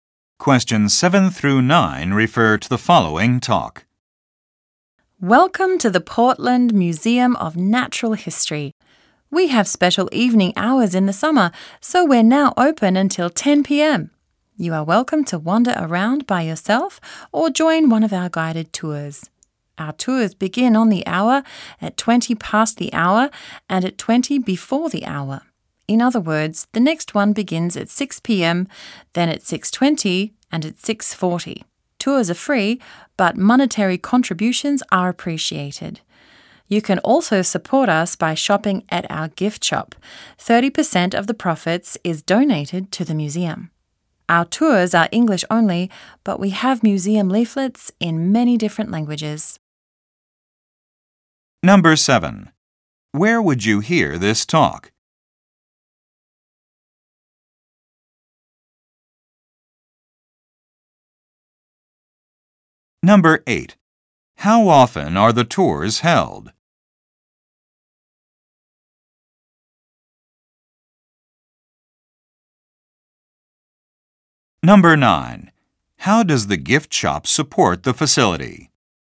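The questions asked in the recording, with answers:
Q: Where would you hear this talk?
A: At a natural history museum

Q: How often are the tours held?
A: Every 20 minutes

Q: How does the gift shop support the facility?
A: It donates 30% of its profits to the museum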